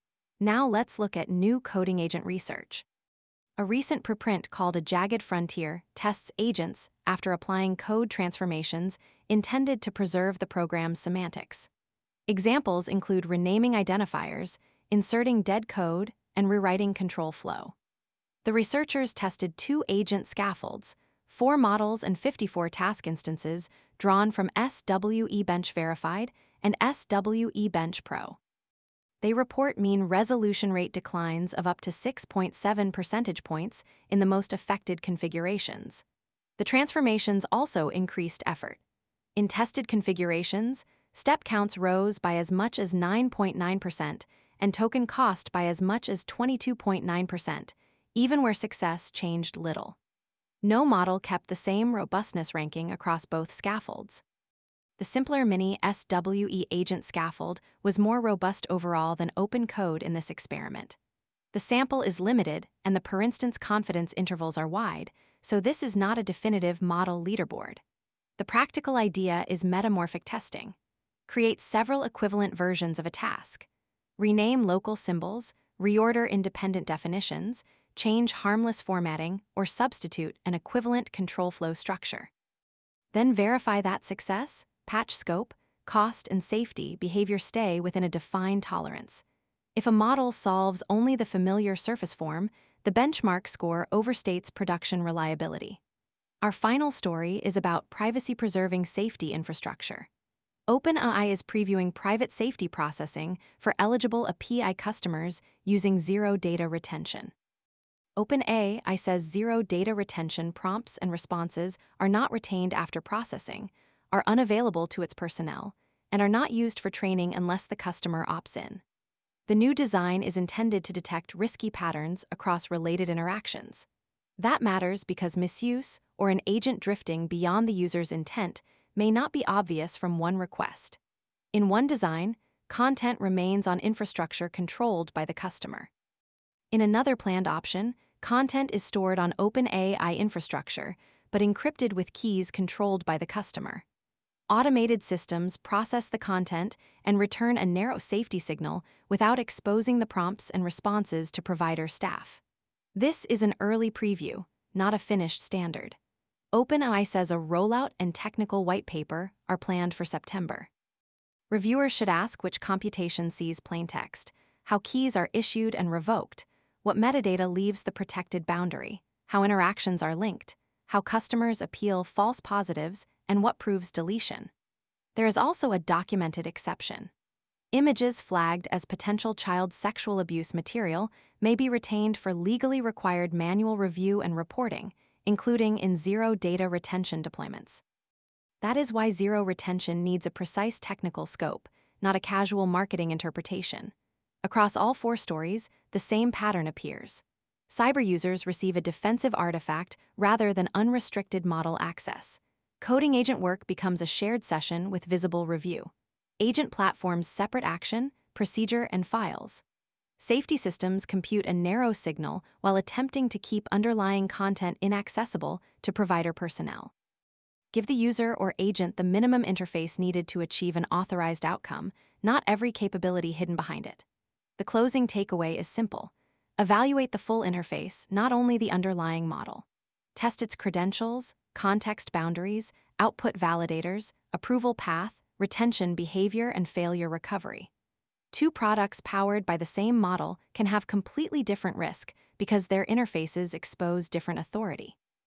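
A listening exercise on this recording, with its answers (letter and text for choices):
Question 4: What does the Jagged Frontier study suggest about coding-agent robustness?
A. One model is always most robust regardless of scaffold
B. Semantics-preserving code changes never affect agents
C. Robustness can vary with both the model and scaffold, while equivalent rewrites may increase failures or cost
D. Only code formatting determines success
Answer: C. Robustness can vary with both the model and scaffold, while equivalent rewrites may increase failures or cost

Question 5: What is OpenAI's Private Safety Processing preview intended to combine?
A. Cross-interaction safety signals with customer-controlled or customer-key-encrypted content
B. Permanent provider access to every customer prompt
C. Public release of confidential API conversations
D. Removal of all safety monitoring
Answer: A. 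Cross-interaction safety signals with customer-controlled or customer-key-encrypted content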